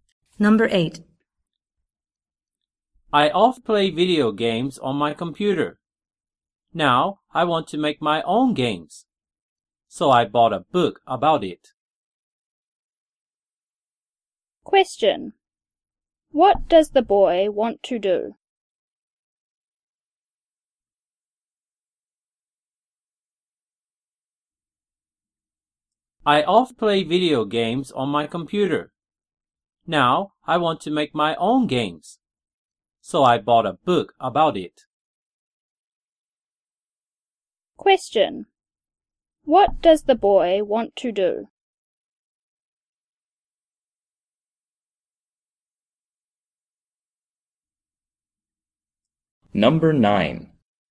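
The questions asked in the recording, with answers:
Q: What does the boy want to do?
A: Make his own video games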